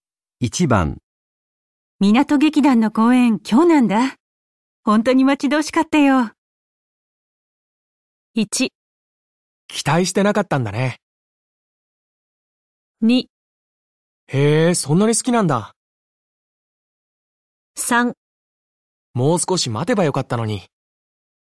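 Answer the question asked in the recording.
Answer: 2: へえ、そんなに好きなんだ。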